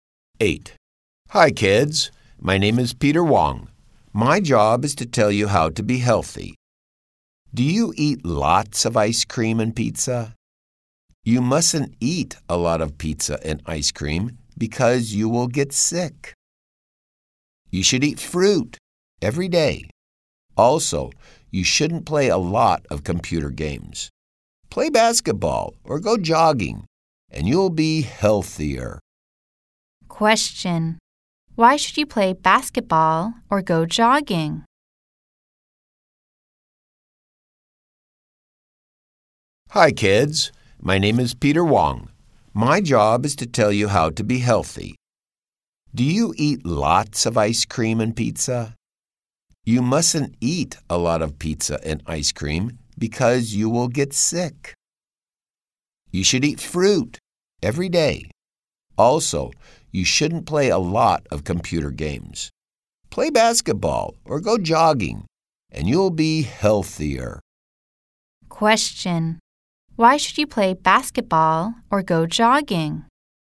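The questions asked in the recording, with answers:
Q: Question. Why should you play basketball or go jogging?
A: To be healthier.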